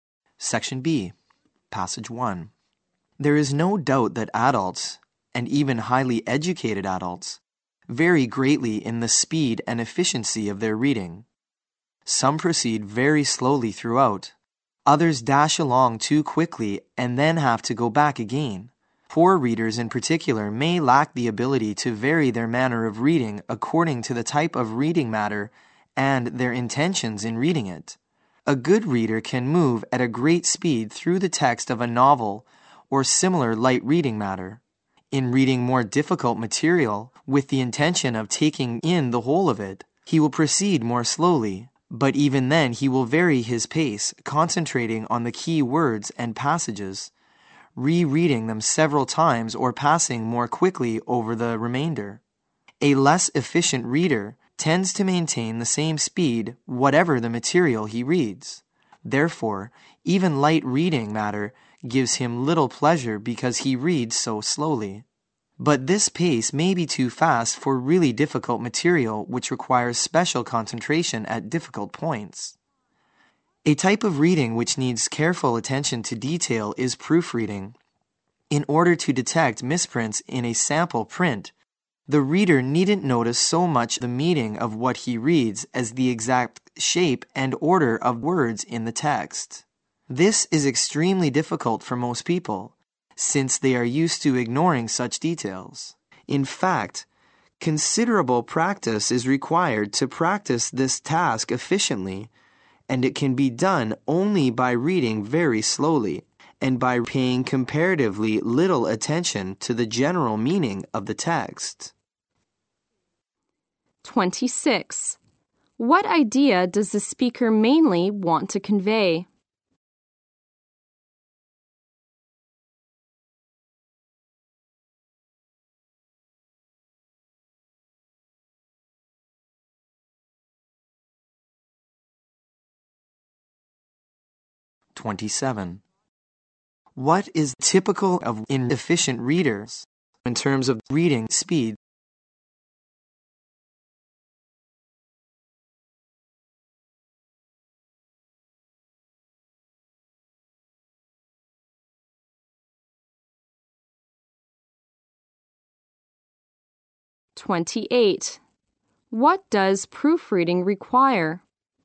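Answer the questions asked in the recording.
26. A good reader changes his reading speed to suit the material and his purpose.
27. They read everything at the same speed.
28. Reading very slowly and paying attention to the exact shape and order of words.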